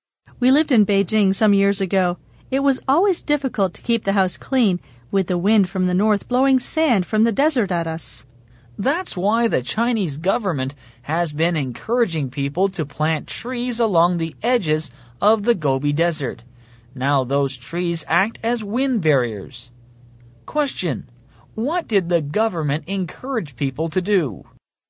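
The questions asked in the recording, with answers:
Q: What did the government encourage people to do?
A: Plant trees along the edges of the Gobi Desert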